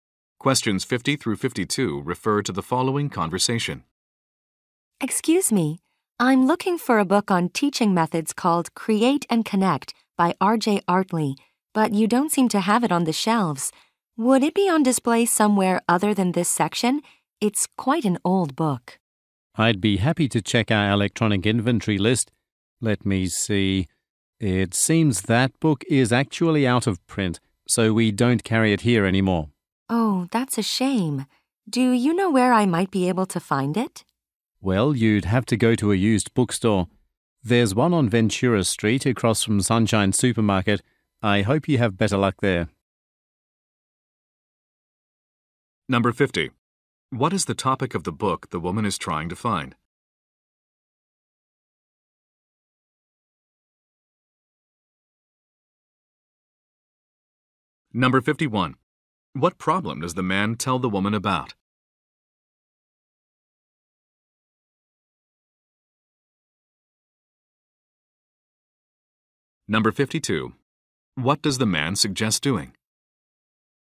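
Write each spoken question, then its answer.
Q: What is the topic of the book the woman is trying to find?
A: Teaching methods

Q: What problem does the man tell the woman about?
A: The book is out of print

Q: What does the man suggest doing?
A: Going to a used bookstore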